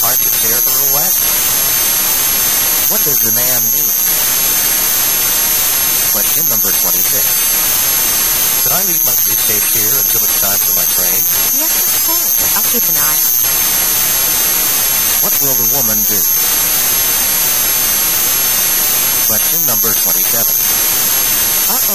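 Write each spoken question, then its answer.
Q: What will the woman do?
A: Watch the man's briefcase until his train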